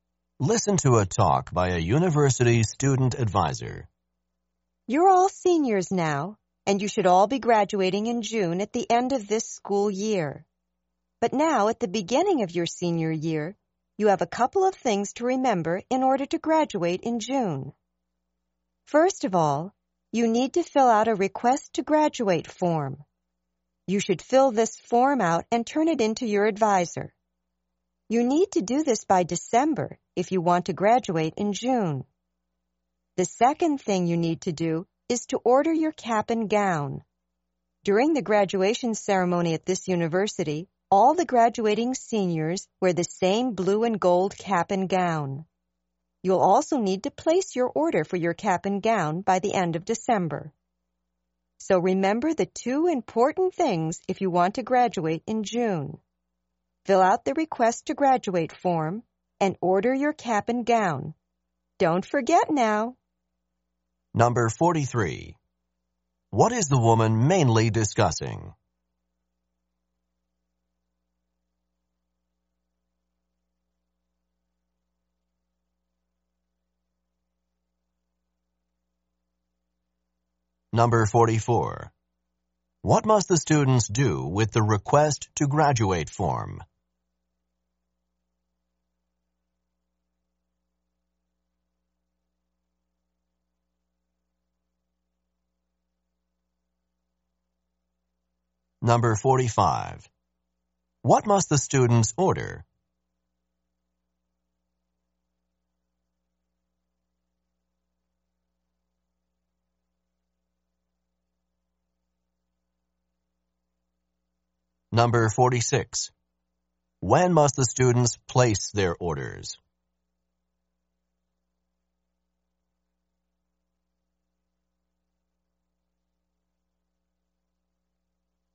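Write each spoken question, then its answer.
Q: What is the woman mainly discussing?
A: Things seniors must do to graduate in June

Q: What must the students do with the request to graduate form?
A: Fill it out and turn it in to their advisor by December

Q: What must the students order?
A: A cap and gown

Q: When must the students place their orders?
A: By the end of December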